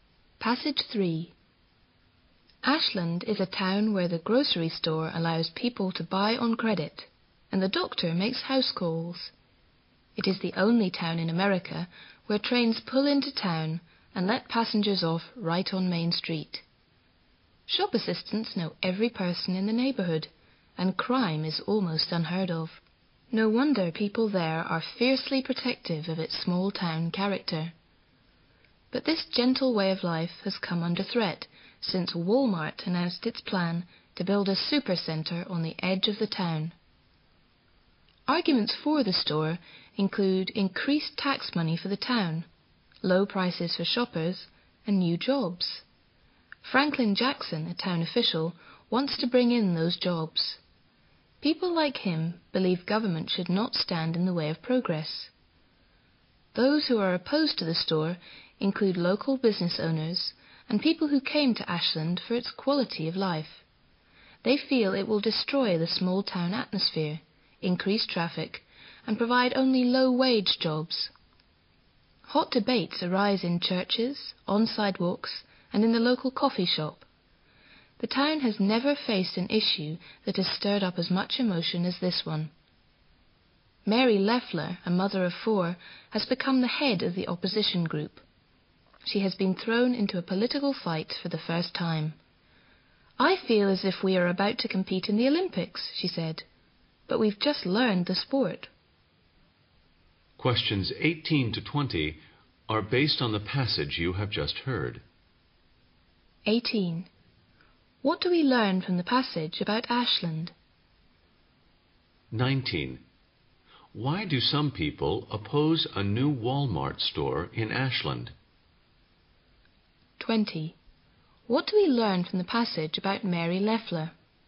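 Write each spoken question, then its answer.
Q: Why do some people oppose a new Walmart store in Ashland?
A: It would destroy the small-town atmosphere

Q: What do we learn from the passage about Mary Leffler?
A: She heads the opposition group and is new to political fights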